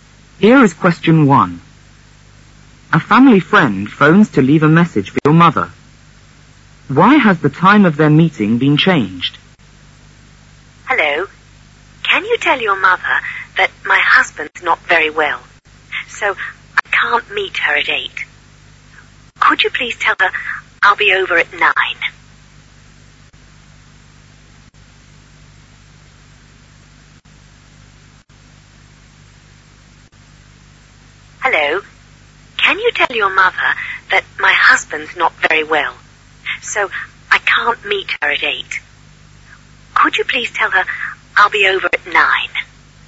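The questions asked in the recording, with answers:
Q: Why has the time of their meeting been changed?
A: Because her husband is not very well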